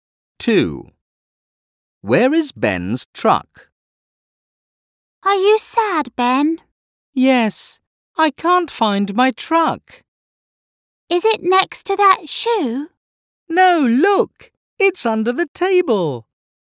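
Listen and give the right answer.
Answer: Under the table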